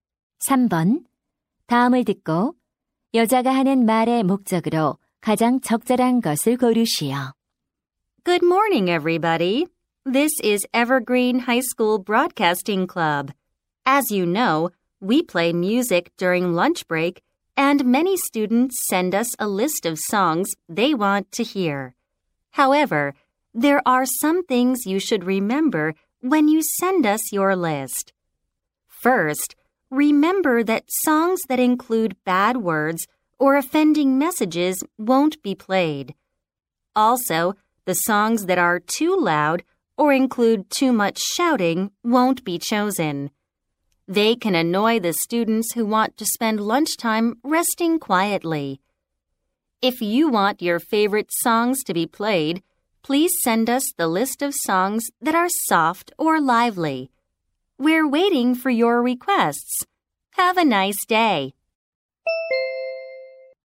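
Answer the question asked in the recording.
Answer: 점심시간 음악 신청 시 부드럽거나 경쾌한 노래를 신청하도록 안내하려고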